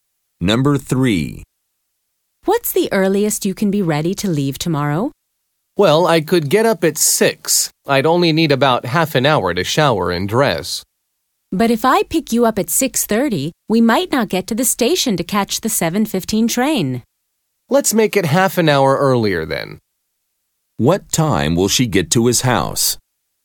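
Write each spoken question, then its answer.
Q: What time will she get to his house?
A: 6:00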